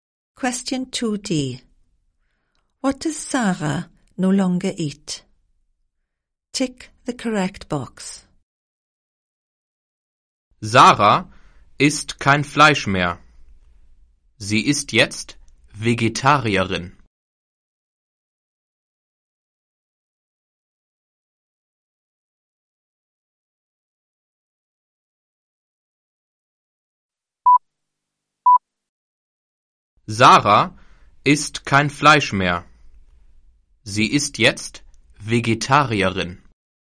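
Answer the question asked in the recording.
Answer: Meat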